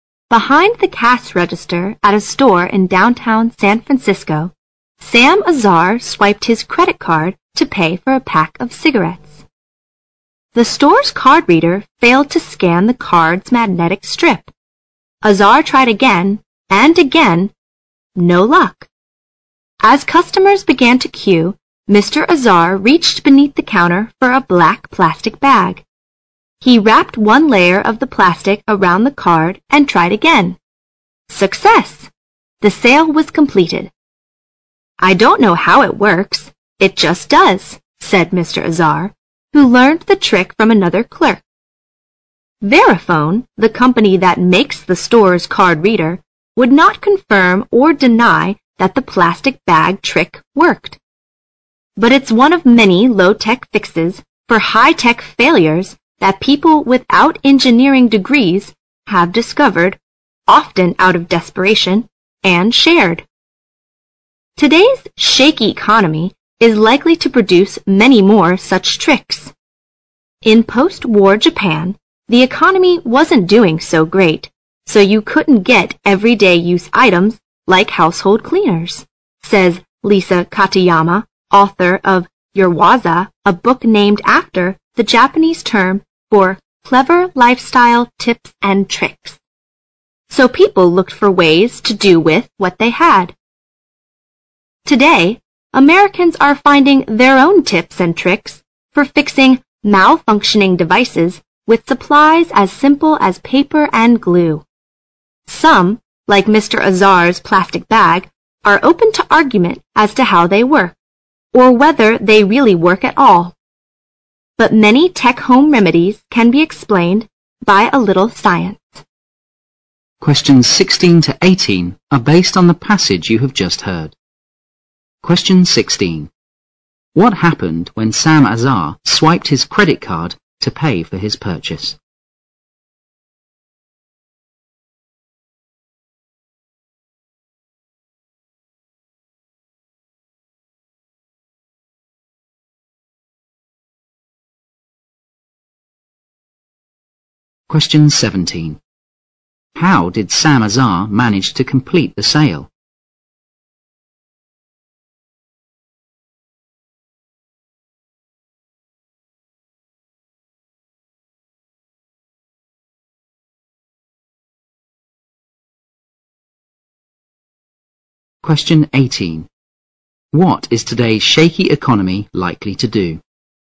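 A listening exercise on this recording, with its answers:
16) What happened when Sam Azar swiped his credit card to pay for his purchase?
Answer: The card reader failed to scan the card's magnetic strip

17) How did Sam Azar manage to complete the sale?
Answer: He wrapped a layer of plastic bag around the card

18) What is today's shaky economy likely to do?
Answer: Produce many more low-tech tricks for fixing high-tech failures

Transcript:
Behind the cash register at a store in downtown San Francisco, Sam Azar swiped his credit card to pay for a pack of cigarettes. The store's card reader failed to scan the card's magnetic strip. Azar tried again and again. No luck. As customers began to queue, Mr. Azar reached beneath the counter for a black plastic bag. He wrapped one layer of the plastic around the card and tried again. Success. The sale was completed. "I don't know how it works. It just does." said Mr. 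Azar who learned the trick from another clerk. Verifone, the company that makes the store's card reader, would not confirm or deny that the plastic bag trick worked. But it's one of many low-tech fixes for high-tech failures that people without engineering degrees have discovered often out of desperation,and shared. Today's shaky economy is likely to produce many more such tricks. "In post-war Japan, the economy wasn't doing so great so you couldn't get everyday-use items like household cleaners," says Lisa Katayama, author of Urawaza, a book named after the Japanese term for clever lifestyle tips and tricks. "So people looked for ways to do with what they had." Today, Americans are finding their own tips and tricks for fixing malfunctioning devices with supplies as simple as paper and glue. Some, like Mr. Azar's plastic bag, are open to argument as to how they work or whether they really work at all. 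But many tech home remedies can be explained by a little science.
Questions 16 to 18 are based on the passage you have just heard.
Question 16.
Question 17. How did Sam Azar manage to complete the sale?
Question 18. What is today's shaky economy likely to do?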